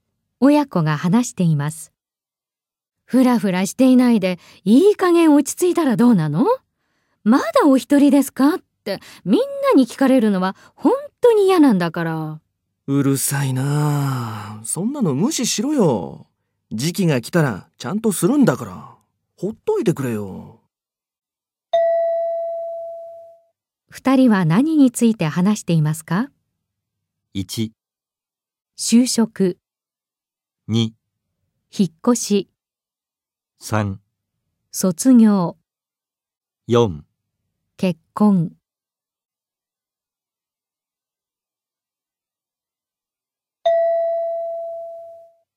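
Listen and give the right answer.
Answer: 4: 結婚。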